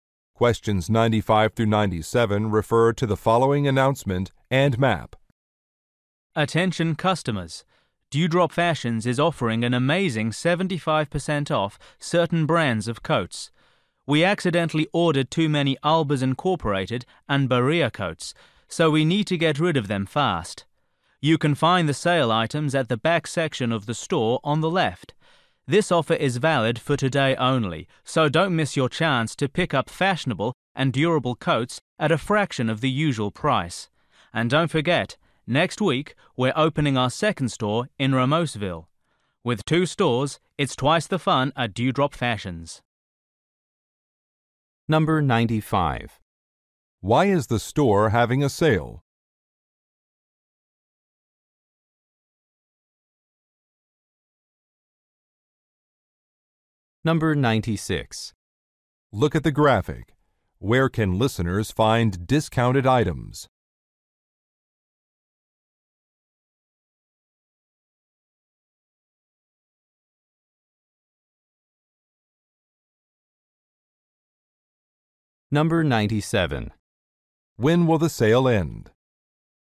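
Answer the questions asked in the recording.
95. It ordered too many coats
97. Today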